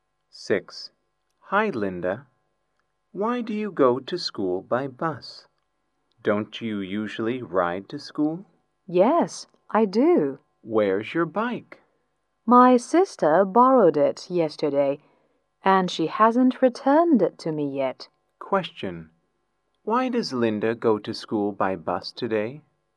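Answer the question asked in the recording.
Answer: Her sister borrowed her bike and hasn't returned it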